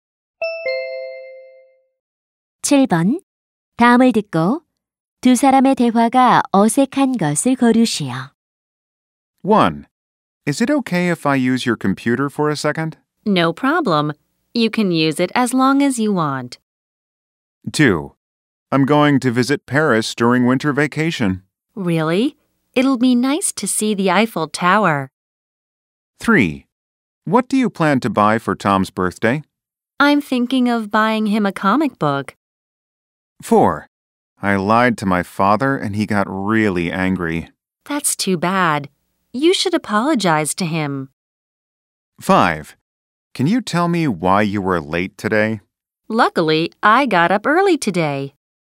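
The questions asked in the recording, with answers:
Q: 다음을 듣고 두 사람의 대화가 어색한 것을 거르시오.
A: 5: Can you tell me why you were late today? / Luckily, I got up early today.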